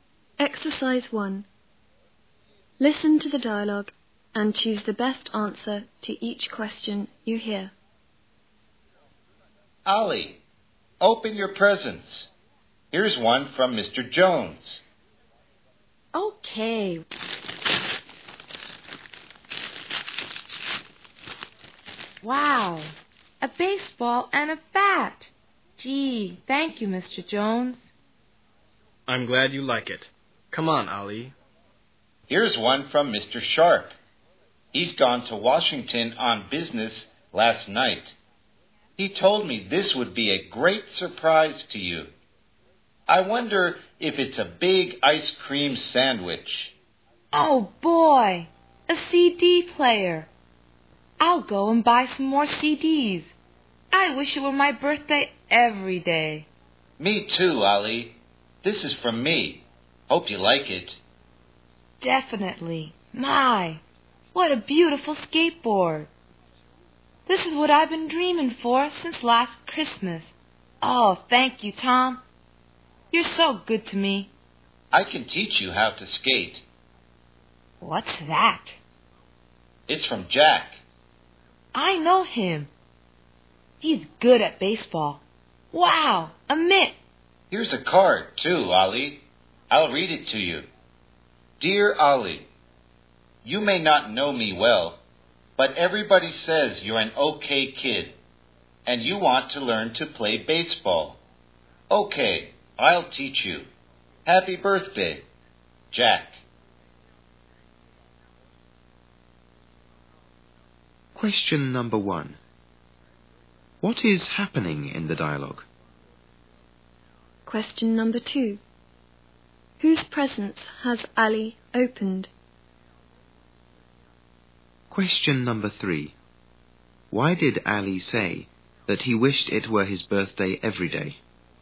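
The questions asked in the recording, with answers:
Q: What is happening in the dialogue?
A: Ali is opening his birthday presents.

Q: Whose presents has Ali opened?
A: Presents from Mr. Jones, Mr. Sharp, Tom and Jack.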